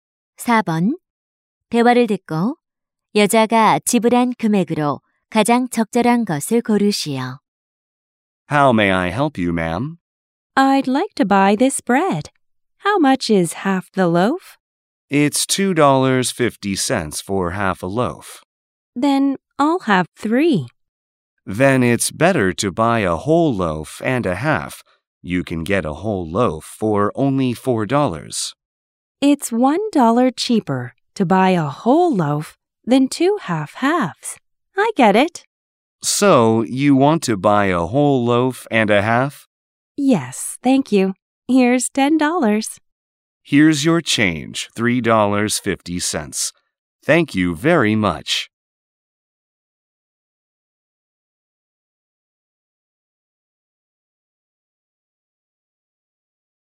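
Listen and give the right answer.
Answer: 6.50달러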